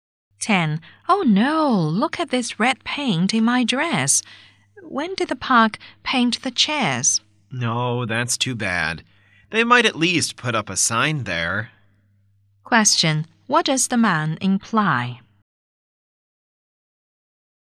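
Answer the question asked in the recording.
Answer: The park should have put up a wet paint sign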